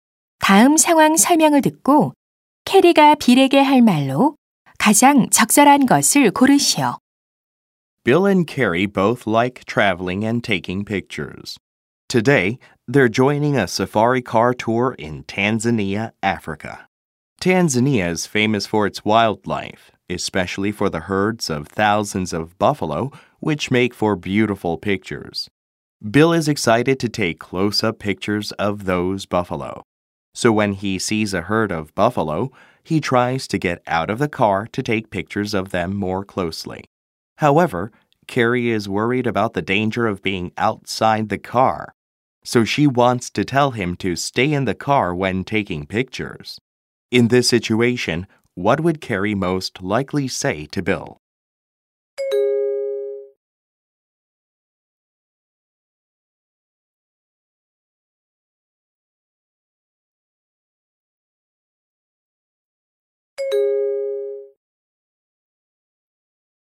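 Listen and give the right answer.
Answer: You'd better stay in the car when taking pictures; it's dangerous to get out.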